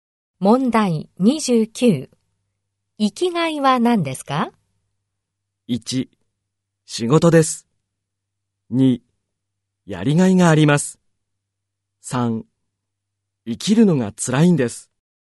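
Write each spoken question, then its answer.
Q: 生きがいは何ですか?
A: 1: 仕事です。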